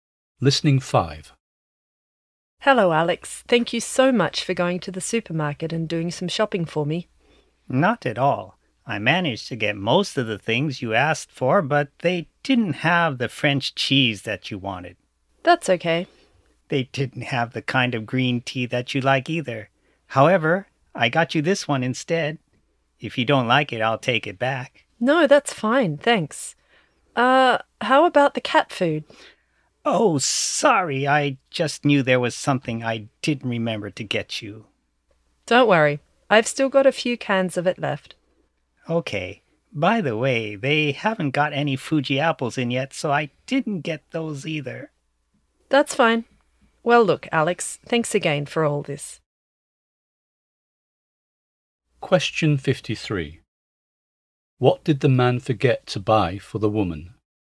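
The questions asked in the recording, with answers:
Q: What did the man forget to buy for the woman?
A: Cat food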